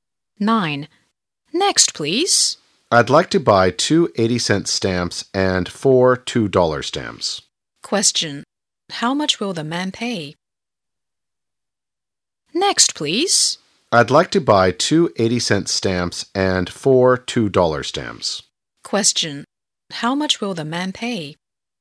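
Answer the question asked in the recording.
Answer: $9.60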